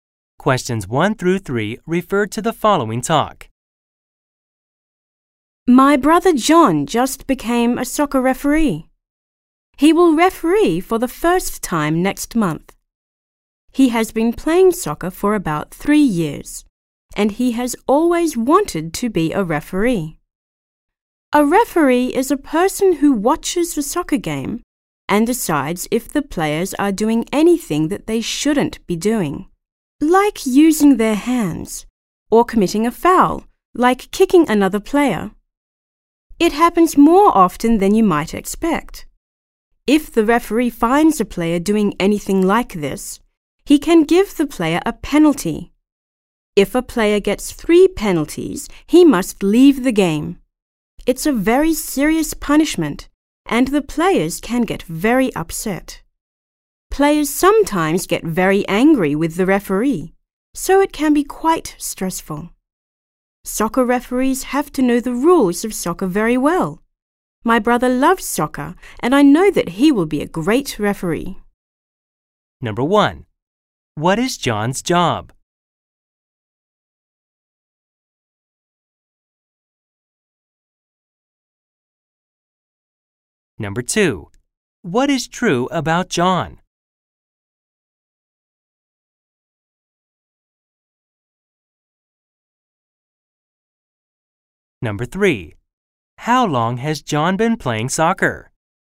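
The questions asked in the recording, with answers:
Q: What is John's job?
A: He is a soccer referee.

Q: How long has John been playing soccer?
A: About 3 years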